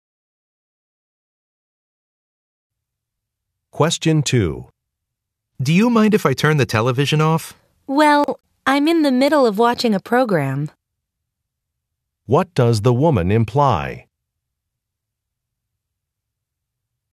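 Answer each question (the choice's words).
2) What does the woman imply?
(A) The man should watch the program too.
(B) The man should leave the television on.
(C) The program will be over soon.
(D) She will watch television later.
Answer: The man should leave the television on.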